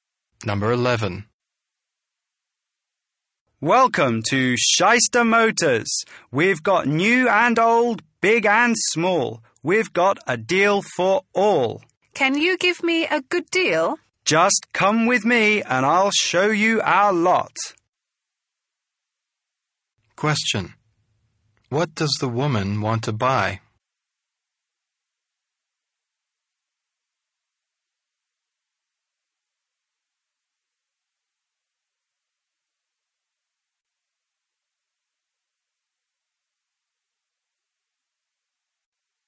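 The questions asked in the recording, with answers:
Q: What does the woman want to buy?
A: A car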